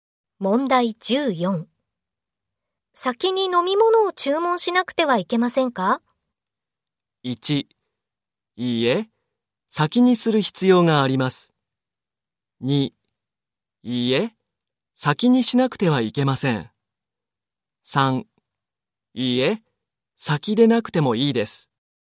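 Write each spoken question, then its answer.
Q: 先に飲み物を注文しなくてはいけませんか?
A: 3: いいえ、先でなくてもいいです。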